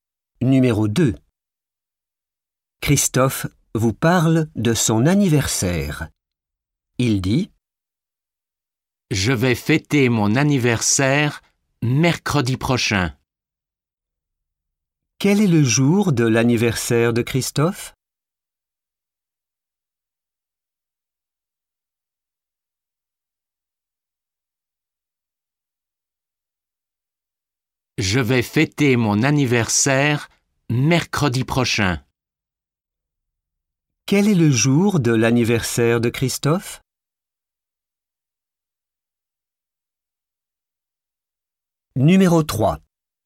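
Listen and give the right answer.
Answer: mercredi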